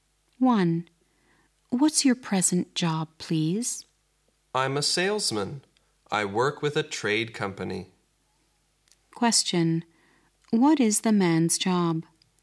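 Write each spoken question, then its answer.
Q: What is the man's job?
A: A salesman at a trade company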